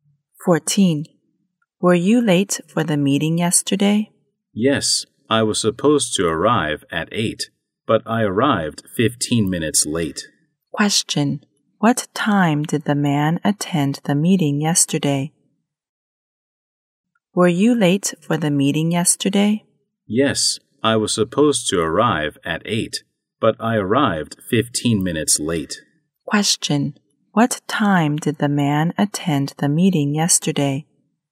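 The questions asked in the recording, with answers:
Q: What time did the man attend the meeting yesterday?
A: At 8:15.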